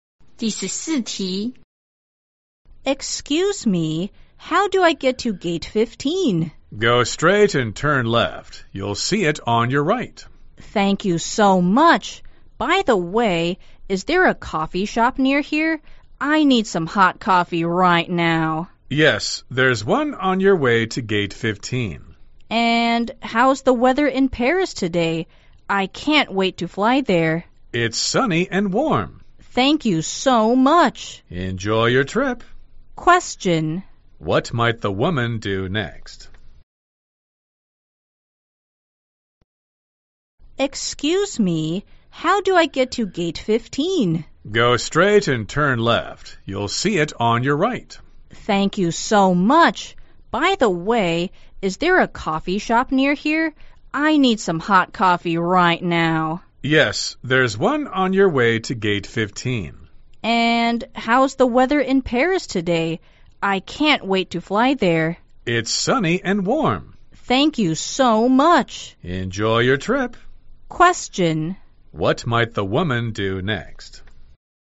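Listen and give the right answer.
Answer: Go to the coffee shop and get some hot coffee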